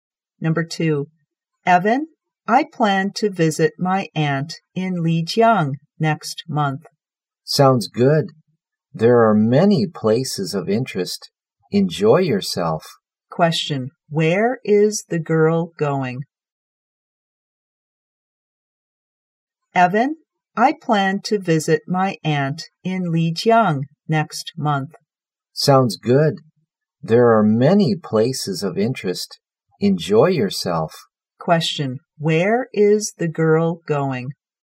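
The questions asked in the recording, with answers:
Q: Question, where is the girl going?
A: Lijiang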